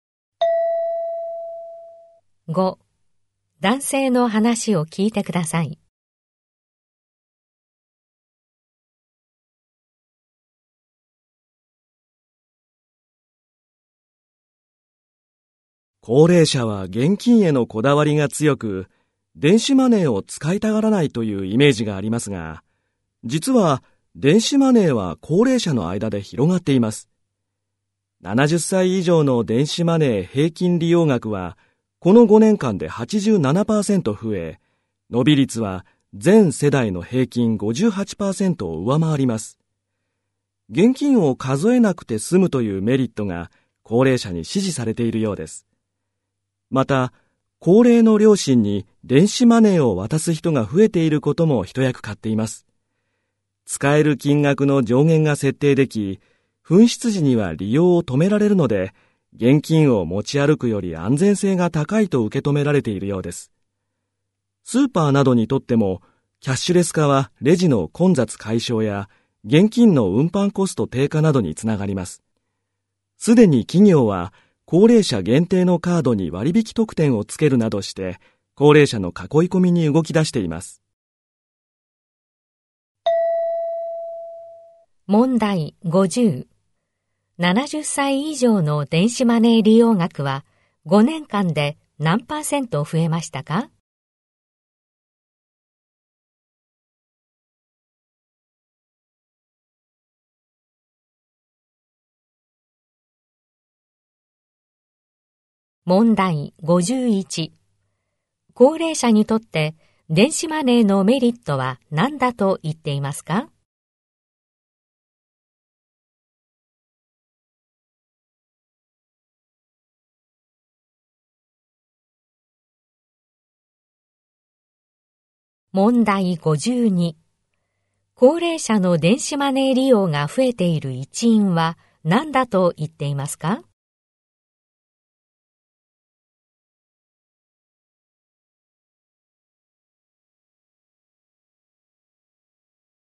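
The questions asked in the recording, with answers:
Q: 70歳以上の電子マネー利用額は5年間で何パーセント増えましたか?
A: 87%

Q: 高齢者にとって電子マネーのメリットは何だと言っていますか?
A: 現金を数えなくて済むこと

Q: 高齢者の電子マネー利用が増えている一因は何だと言っていますか?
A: 高齢の両親に電子マネーを渡す人が増えていること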